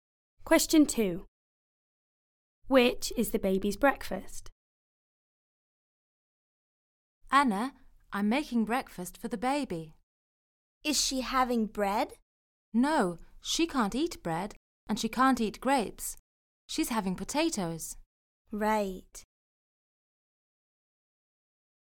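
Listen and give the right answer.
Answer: potatoes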